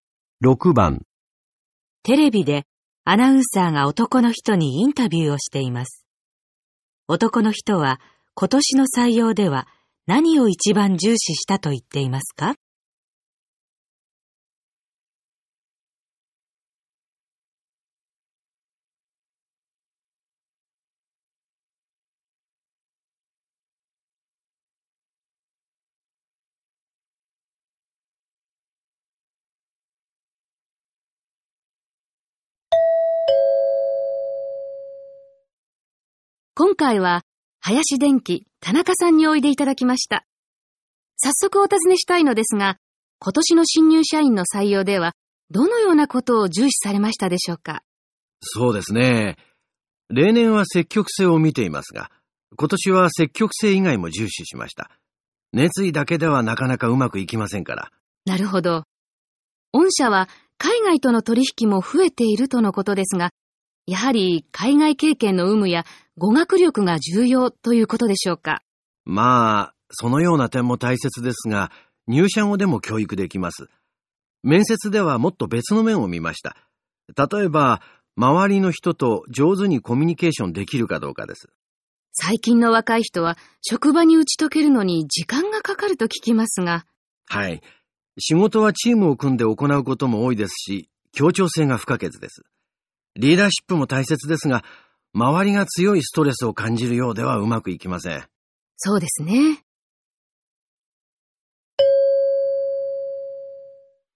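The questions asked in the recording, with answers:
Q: 男の人は今年の採用では何を一番重視したと言っていますか?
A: 協調性(周りの人と上手にコミュニケーションできるか)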